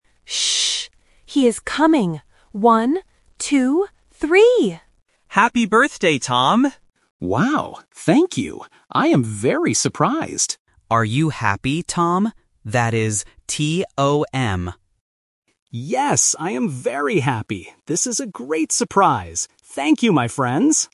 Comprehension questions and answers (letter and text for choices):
Listen to the conversation and choose the correct answer for each question.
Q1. What is the birthday boy's name?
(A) Tim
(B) Tom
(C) Tony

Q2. What do the friends say to him?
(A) Happy New Year!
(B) Happy Birthday!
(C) Good morning!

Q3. How does the boy feel?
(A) Surprised and happy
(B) Angry and tired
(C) Sad and bored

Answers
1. (B) Tom
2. (B) Happy Birthday!
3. (A) Surprised and happy

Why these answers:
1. The correct answer is (B). Ben spells the name very clearly: "T-O-M." Option (A) "Tim" is a sound trap because it shares the same first and last letters. Option (C) "Tony" is a plausible name but is not mentioned.
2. The correct answer is (B). All the friends shout, "Happy Birthday, Tom!" Option (A) "Happy New Year!" is a trap using another common celebration phrase. Option (C) "Good morning!" is never mentioned.
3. The correct answer is (A). Tom explicitly says, "I am very surprised!" and later confirms, "Yes, I am very happy!" Options (B) "Angry and tired" and (C) "Sad and bored" are negative emotions that do not fit the audio and are never mentioned.

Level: A1